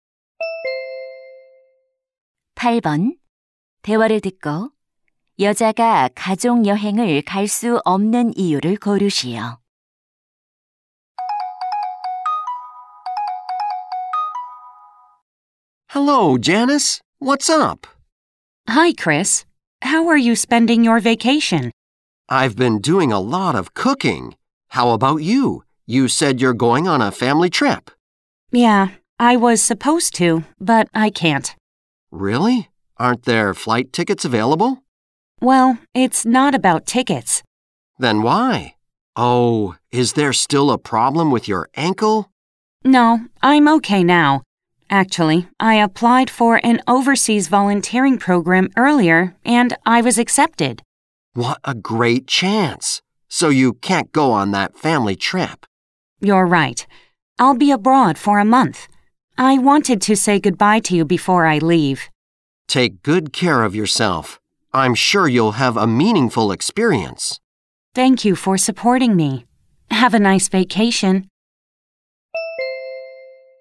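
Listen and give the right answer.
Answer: 해외 봉사 프로그램에 참가하게 되어서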